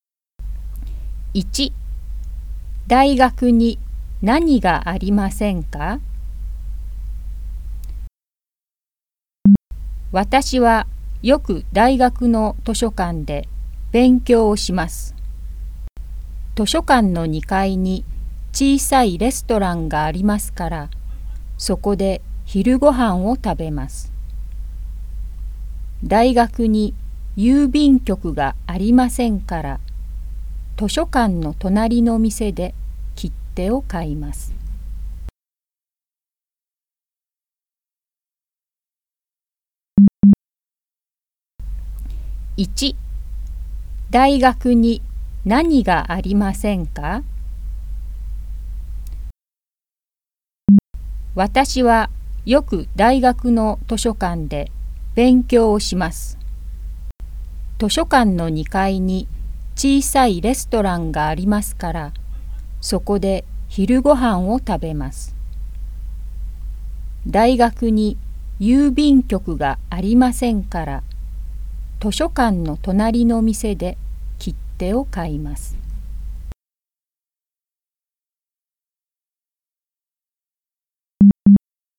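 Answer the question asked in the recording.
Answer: 郵便局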